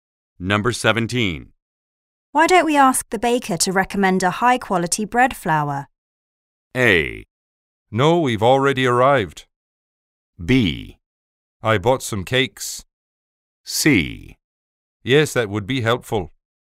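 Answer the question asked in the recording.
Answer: C: Yes, that would be helpful.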